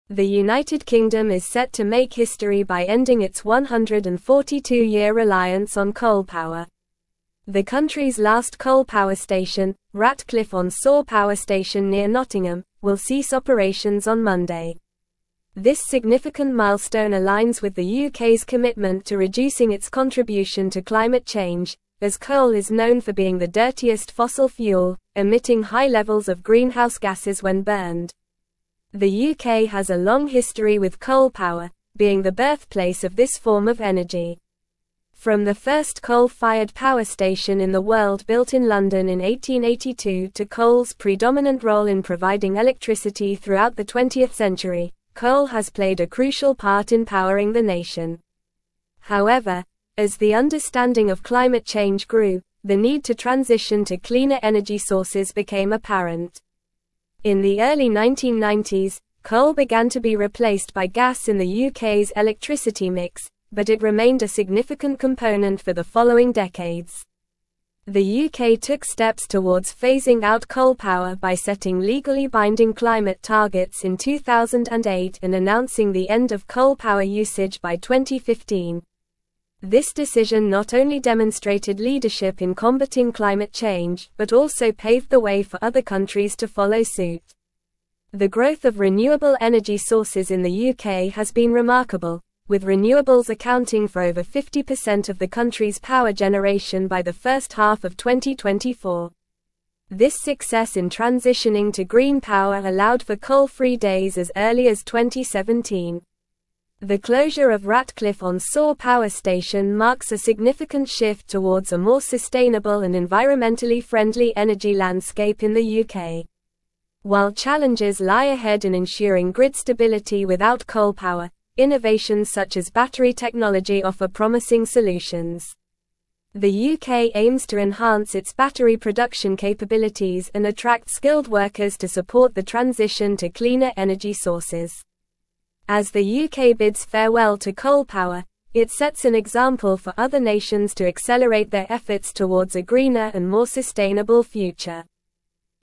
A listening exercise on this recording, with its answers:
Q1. The United Kingdom is set to make (1)______ by ending its 142-year reliance on coal power.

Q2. The country's last coal power station, Ratcliffe-on-Soar Power Station near Nottingham, will (2)______ operations on Monday.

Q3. as coal is known for being the dirtiest (3)______ fuel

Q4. emitting high levels of greenhouse (4)______ when burned.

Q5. From the first coal-fired power station in the world built in (5)______ in 1882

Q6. coal has (6)______ a crucial part in powering the nation.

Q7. In the early (7)______, coal began to be replaced by gas in the UK's electricity mix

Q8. but it (8)______ a significant component for the following decades.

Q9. This decision not only demonstrated leadership in combating climate (9)______ but also paved the way for other countries to follow suit.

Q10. with renewables accounting for over 50% of the country's power generation by the (10)______ half of 2024.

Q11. This success in transitioning to (11)______ power (12)______ for coal-free days as early as 2017.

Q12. This success in transitioning to (11)______ power (12)______ for coal-free days as early as 2017.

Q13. innovations such as (13)______ technology offer promising solutions.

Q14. The UK aims to enhance its battery production (14)______ and (15)______ skilled workers to support the transition to cleaner energy sources.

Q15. The UK aims to enhance its battery production (14)______ and (15)______ skilled workers to support the transition to cleaner energy sources.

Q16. As the UK bids (16)______ to coal power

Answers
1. history
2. cease
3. fossil
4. gases
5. London
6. played
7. 1990s
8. remained
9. change
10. first
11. green
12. allowed
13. battery
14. capabilities
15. attract
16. farewell

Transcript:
The United Kingdom is set to make history by ending its 142-year reliance on coal power. The country's last coal power station, Ratcliffe-on-Soar Power Station near Nottingham, will cease operations on Monday. This significant milestone aligns with the UK's commitment to reducing its contribution to climate change, as coal is known for being the dirtiest fossil fuel, emitting high levels of greenhouse gases when burned.
The UK has a long history with coal power, being the birthplace of this form of energy. From the first coal-fired power station in the world built in London in 1882 to coal's predominant role in providing electricity throughout the twentieth century, coal has played a crucial part in powering the nation. However, as the understanding of climate change grew, the need to transition to cleaner energy sources became apparent.
In the early 1990s, coal began to be replaced by gas in the UK's electricity mix, but it remained a significant component for the following decades. The UK took steps towards phasing out coal power by setting legally binding climate targets in 2008 and announcing the end of coal power usage by 2015. This decision not only demonstrated leadership in combating climate change but also paved the way for other countries to follow suit.
The growth of renewable energy sources in the UK has been remarkable, with renewables accounting for over 50% of the country's power generation by the first half of 2024. This success in transitioning to green power allowed for coal-free days as early as 2017. The closure of Ratcliffe-on-Soar Power Station marks a significant shift towards a more sustainable and environmentally friendly energy landscape in the UK.
While challenges lie ahead in ensuring grid stability without coal power, innovations such as battery technology offer promising solutions. The UK aims to enhance its battery production capabilities and attract skilled workers to support the transition to cleaner energy sources. As the UK bids farewell to coal power, it sets an example for other nations to accelerate their efforts towards a greener and more sustainable future.

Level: Level 4